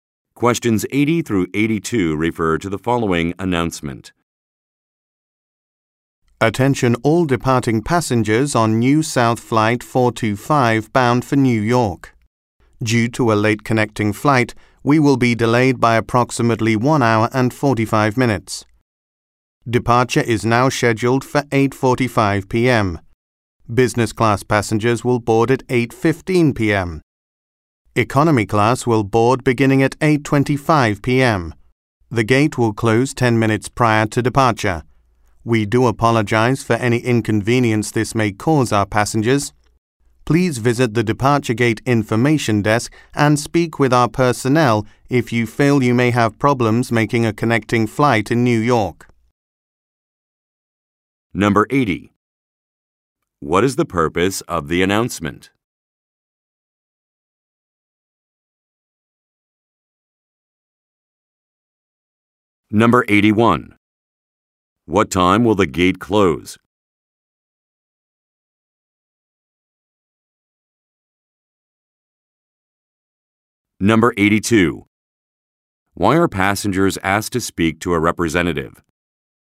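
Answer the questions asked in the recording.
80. To announce that the flight is delayed
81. 8:35 p.m.
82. If they think they may have problems making a connecting flight in New York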